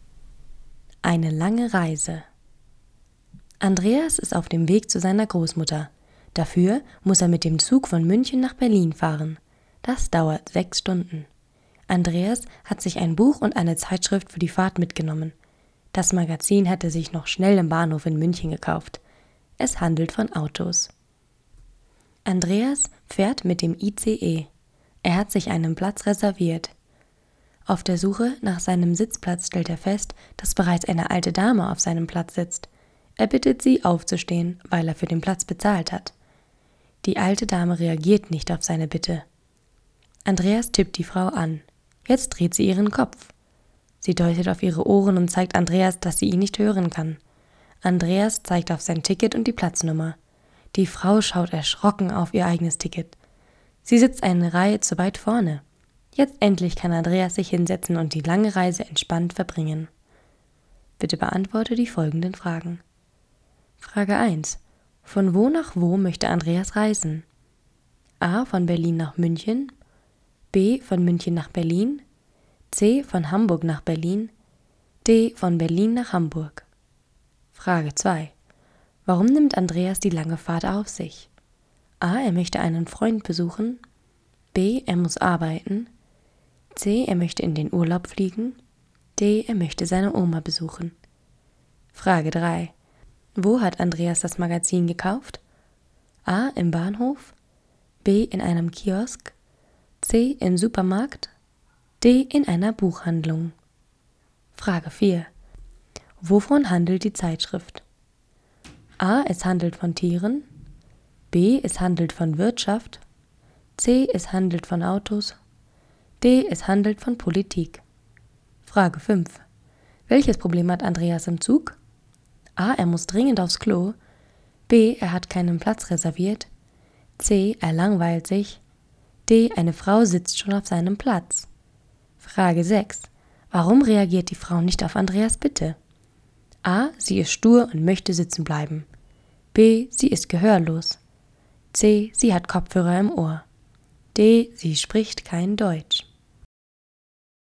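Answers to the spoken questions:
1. B: Von München nach Berlin.
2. D: Er möchte seine Oma besuchen.
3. A: Im Bahnhof.
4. C: Es handelt von Autos.
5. D: Eine Frau sitzt schon auf seinem Platz.
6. B: Sie ist gehörlos.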